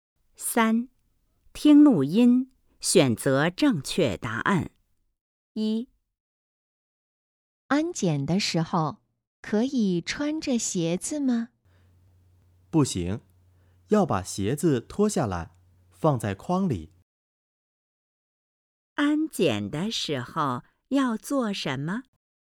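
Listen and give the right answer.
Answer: 把鞋子脱下来,放在筐里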